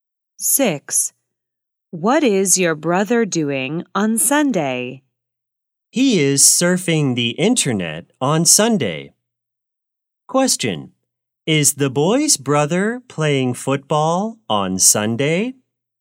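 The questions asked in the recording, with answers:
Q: Is the boy's brother playing football on Sunday?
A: No, he is surfing the internet.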